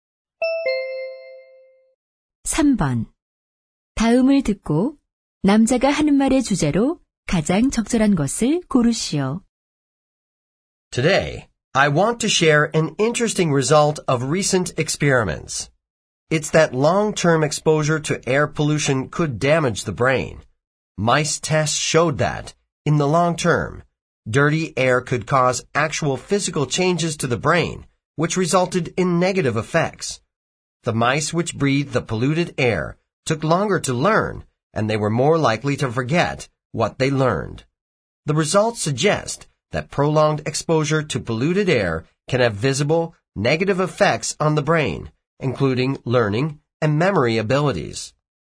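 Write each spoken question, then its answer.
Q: 다음을 듣고 남자가 하는 말의 주제로 가장 적절한 것을 고르시오.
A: 대기 오염이 뇌에 미치는 부정적 영향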